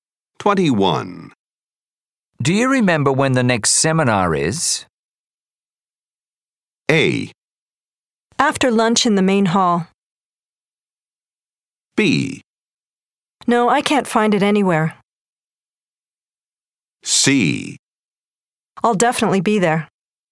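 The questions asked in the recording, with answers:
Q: Do you remember when the next seminar is?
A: A: After lunch in the main hall.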